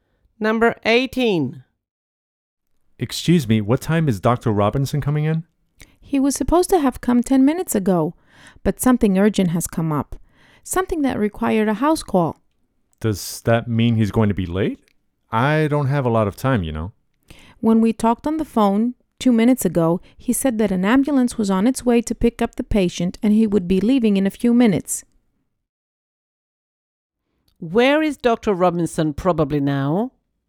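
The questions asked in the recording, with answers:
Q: Where is Dr. Robinson probably now?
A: At a patient's house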